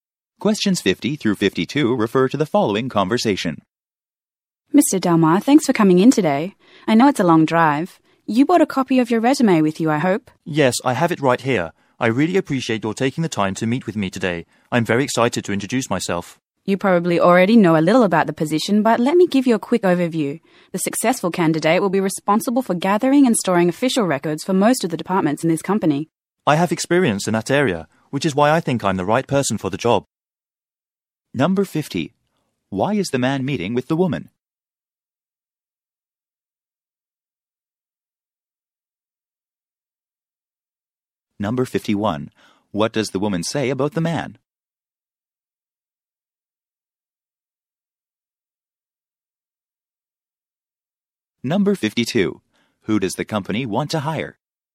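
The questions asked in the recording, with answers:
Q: Why is the man meeting with the woman?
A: For a job interview

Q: What does the woman say about the man?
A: He has come a long way to get there

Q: Who does the company want to hire?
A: Someone to gather and store official records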